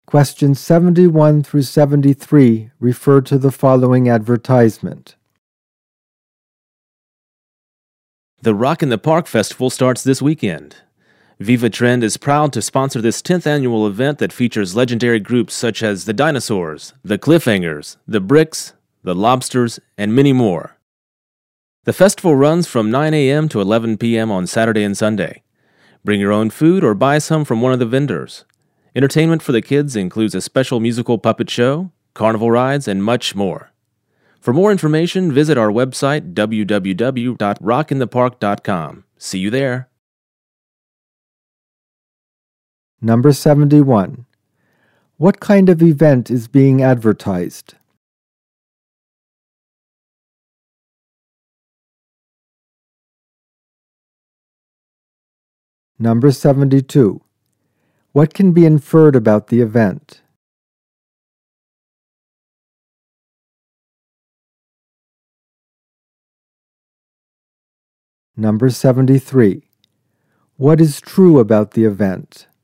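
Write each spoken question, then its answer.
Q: What kind of event is being advertised?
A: A music festival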